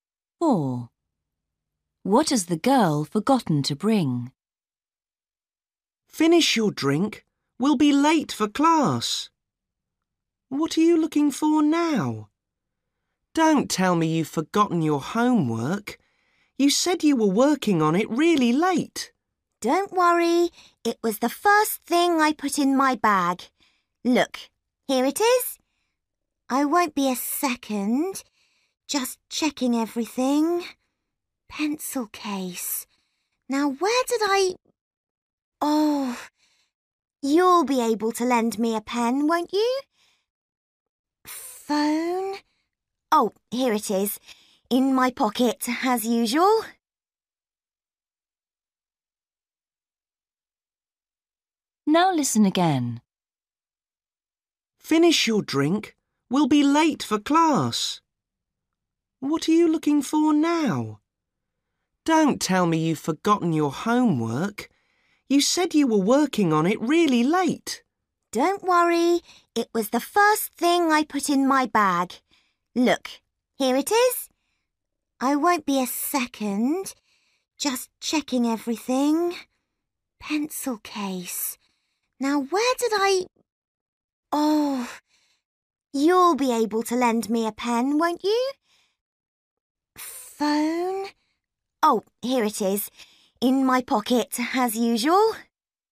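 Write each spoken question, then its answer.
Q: What has the girl forgotten to bring?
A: A pen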